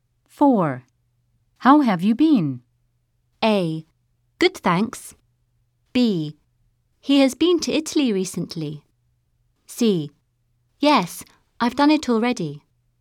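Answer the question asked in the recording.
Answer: A: Good, thanks.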